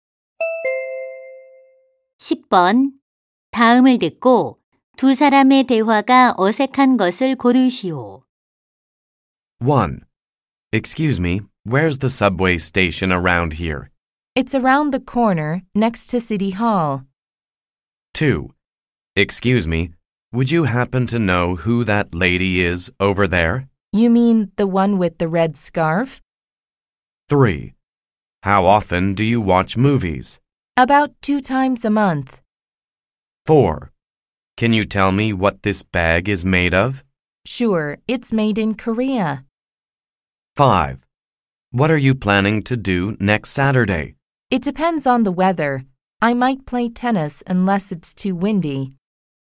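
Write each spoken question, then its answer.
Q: 다음을 듣고 두 사람의 대화가 어색한 것을 고르시오.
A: 4: Can you tell me what this bag is made of? - Sure, it's made in Korea.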